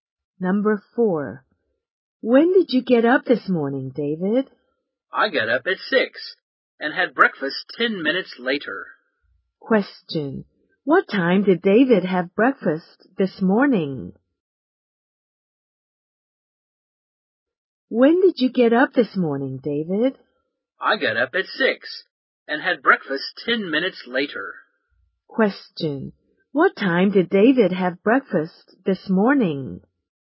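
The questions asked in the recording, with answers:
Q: What time did David have breakfast this morning?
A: At 6:10.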